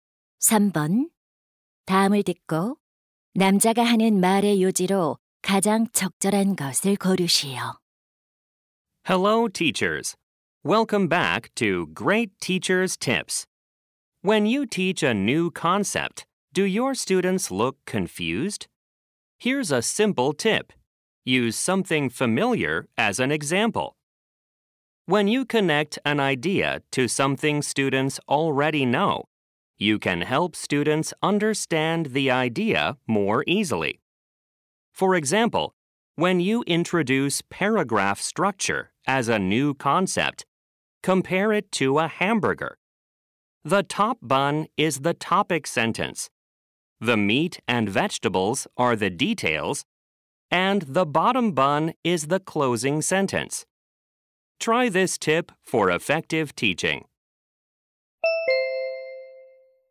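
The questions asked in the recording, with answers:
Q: 다음을 듣고 남자가 하는 말의 요지로 가장 적절한 것을 고르시오.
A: 새로운 개념을 가르칠 때 익숙한 것을 예로 들면 이해를 도울 수 있다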